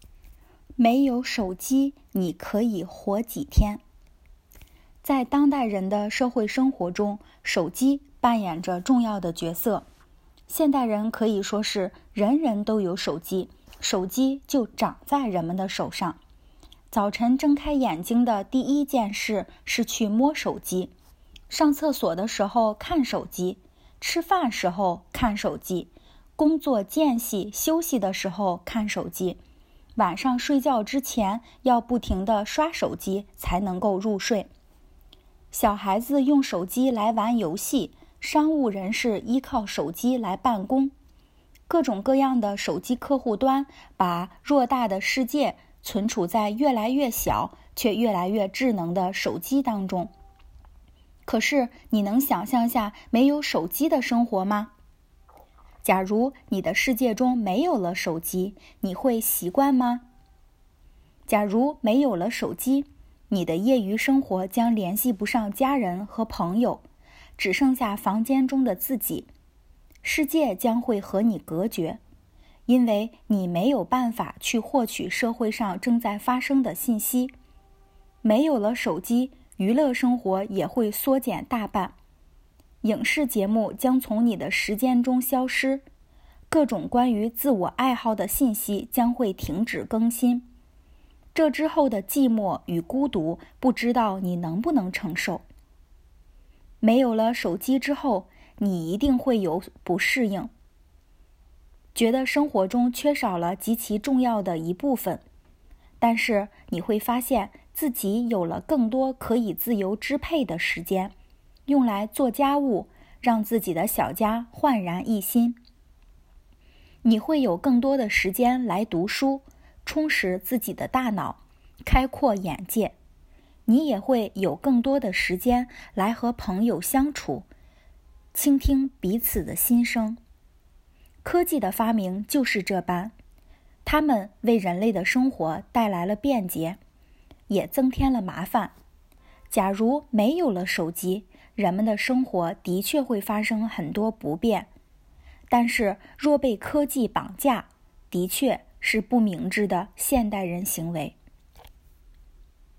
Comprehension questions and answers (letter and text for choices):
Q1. 手机带来的好处不包括什么?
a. 娱乐方式增多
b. 办公更加便捷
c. 自由支配时间增多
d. 人与人之间联系紧密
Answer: c. 自由支配时间增多

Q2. 作者对科技与生活的态度是什么?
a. 完全支持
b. 坚决反对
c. 没有体现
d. 辩证看待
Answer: d. 辩证看待

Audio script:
没有手机你可以活几天?
在当代人的社会生活中,手机扮演着重要的角色。现代人可以说是,人人都有手机,手机就"长"在人们的手上。早晨睁开眼睛的第一件事是去摸手机,上厕所的时候看手机,吃饭时候看手机,工作间隙休息的时候看手机,晚上睡觉之前要不停的刷手机才能够入睡。小孩子用手机来玩游戏,商务人士依靠手机来办公。各种各样的手机客户端把偌大的世界存储在越来越小,却越来越智能的手机当中。
可是你能想象下没有手机的生活吗?假如你的世界中没有了手机,你会习惯吗?
假如没有了手机,你的业余生活将联系不上家人和朋友,只剩下房间中的自己。世界将会和你隔绝,因为你没有办法去获取社会上正在发生的信息。没有了手机,娱乐生活也会缩减大半。影视节目将从你的时间中消失,各种关于自我爱好的信息将会停止更新。这之后的寂寞与孤独不知道你能不能承受?
没有了手机之后,你一定会有不适应,觉得生活中缺少了及其重要的一部分。但是,你会发现自己有了更多可以自由支配的时间,用来做家务,让自己的小家焕然一新。你会有更多的时间来读书,充实自己的大脑,开阔眼界。你也会有更多的时间来和朋友相处,倾听彼此的心声。
科技的发明就是这般,它们为人类的生活带来了便捷,也增添了麻烦。假如没有了手机,人们的生活的确会发生很多不便,但是若被科技绑架,的确是不明智的现代人行为。

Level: advanced